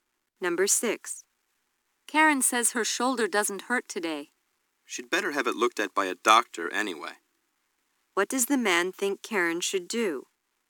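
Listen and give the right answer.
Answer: See a doctor about her shoulder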